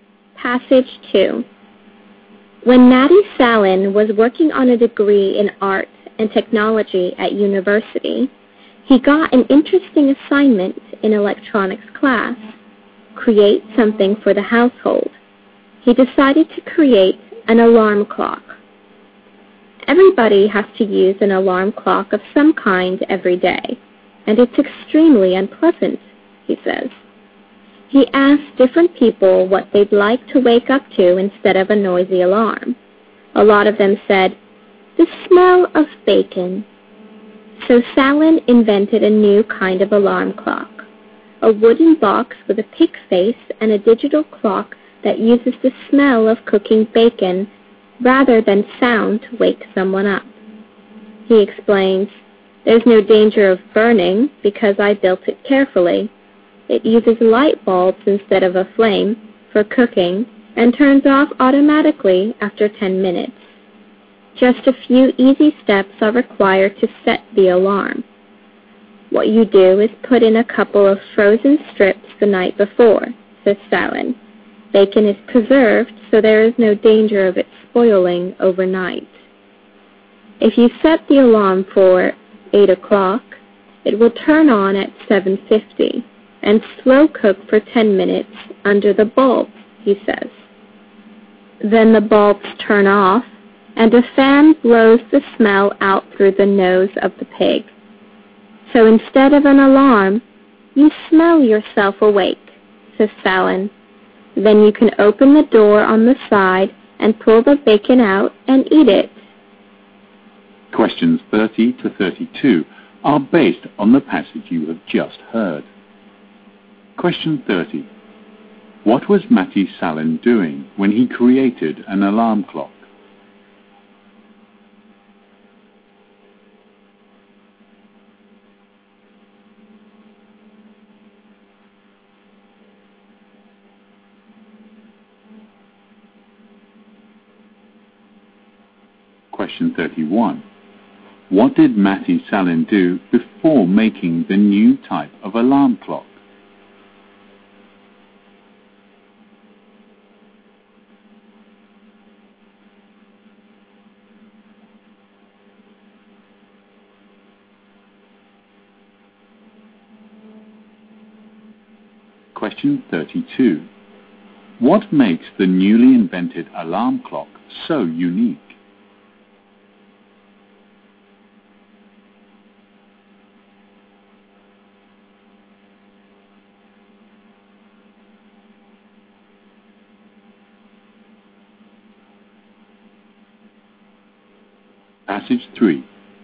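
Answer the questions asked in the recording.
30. Working on a university degree in art and technology (an electronics class assignment).
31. He asked people what they would like to wake up to.
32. It wakes people with the smell of cooking bacon instead of a sound.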